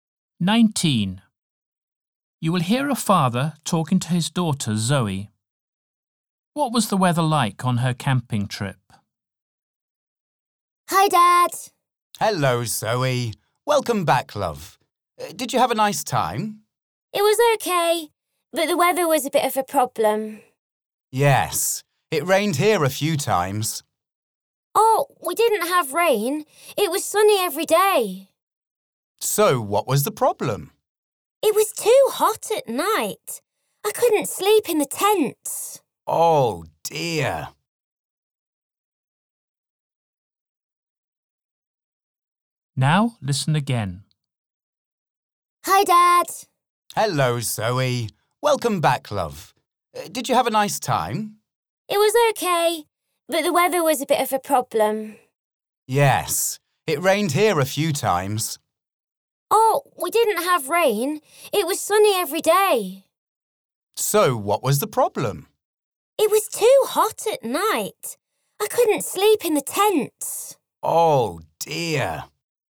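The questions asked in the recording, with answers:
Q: What was the weather like on her camping trip?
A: Sunny and hot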